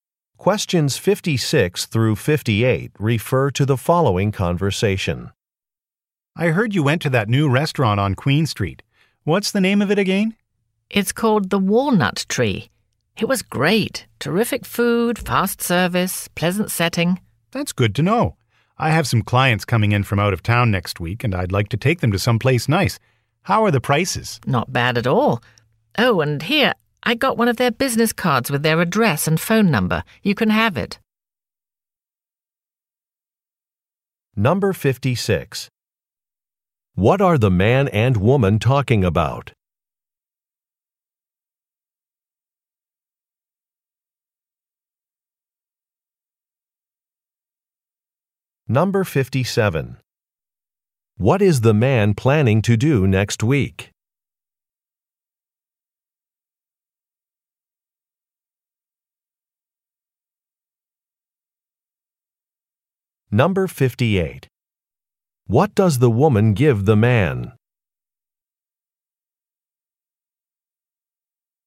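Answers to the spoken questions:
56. A new restaurant
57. Take clients out to a restaurant
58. The restaurant's business card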